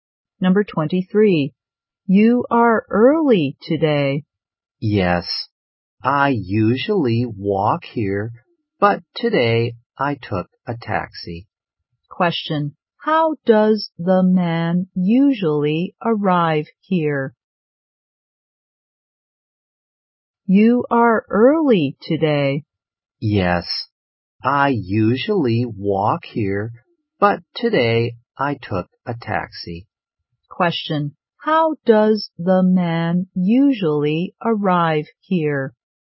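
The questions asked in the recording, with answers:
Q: How does the man usually arrive here?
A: He walks.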